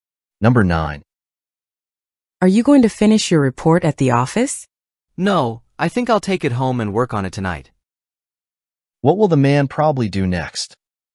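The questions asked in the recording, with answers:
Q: What will the man probably do next?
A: Take the report home and work on it tonight.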